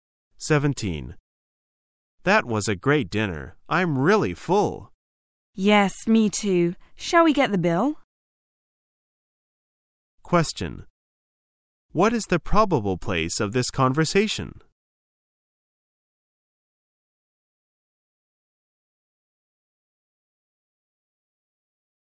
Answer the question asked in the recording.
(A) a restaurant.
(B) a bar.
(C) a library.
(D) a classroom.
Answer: (A) a restaurant.

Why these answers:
此题考查从内容推测的能力。解题关键在于听到"that was a great dinner,I am really full,"以及"should we get the bill?"意为"我们结账吧?".从而判断答案A。